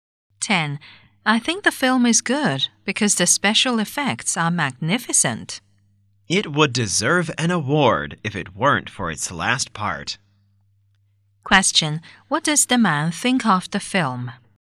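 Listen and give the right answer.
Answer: It is good except for its last part.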